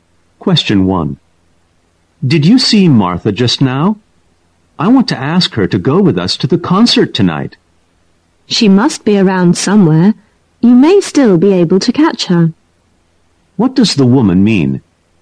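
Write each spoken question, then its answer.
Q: What does the woman mean?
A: Martha is probably still nearby, so the man may still catch her.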